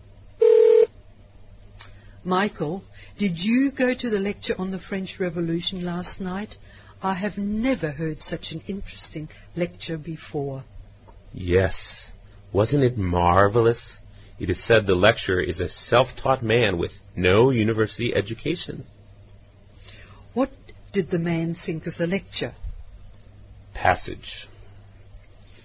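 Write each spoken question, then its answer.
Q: What did the man think of the lecture?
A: It was marvelous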